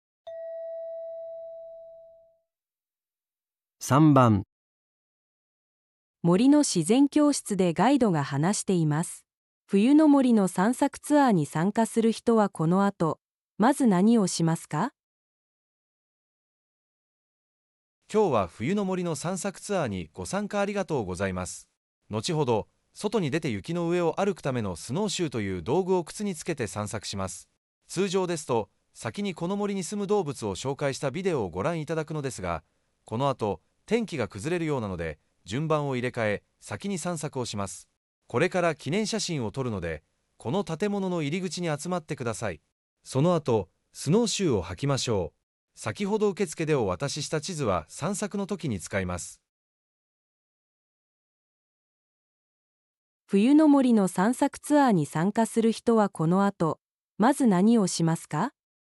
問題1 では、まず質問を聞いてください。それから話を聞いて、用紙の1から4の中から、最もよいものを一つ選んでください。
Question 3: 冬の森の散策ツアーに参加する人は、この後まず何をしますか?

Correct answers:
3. 3

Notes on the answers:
1.❌错误 → 穿雪鞋是「之后(その後)」的步骤,并非「首先」。 2.❌错误 → 原本应先看视频,但因之后天气变差,调整顺序改为「先徒步」,视频观看被延后。 3.✅正确 → 导游明确指示「现在要拍纪念照,请到入口集合(これから記念写真を撮るので、この建物の入り口に集まってください)」,这是最优先动作。 4.❌错误 → 地图「已在前台发放(先ほど受付でお渡しした)」,属于已完成事项。 关键点梳理: 时间顺序:调整后的流程为「集合拍照 → 穿雪鞋徒步 →(天气允许时)看视频」。 动作主体:集合拍照是「现在立刻执行」的指令,必须最先完成。 排除干扰:注意「原本流程≠实际执行」,天气变化导致顺序改变是解题核心。

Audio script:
森の自然教室で、ガイドが話しています。冬の森の散策ツアーに参加する人は、この後まず何をしますか?
今日は冬の森の散策ツアーにご参加、ありがとうございます。
後ほど外に出て雪の上を歩くためのスノーシューという道具を靴につけて散策します。
通常ですと、先にこの森に住む動物を紹介したビデオをご覧いただくのですが、この後天気が崩れるようなので順番を入れ替え、先に散策をします。
これから記念写真を撮るので、この建物の入り口に集まってください。
その後スノーシューを履きましょう。
先ほど受付でお渡しした地図は散策の時に使います。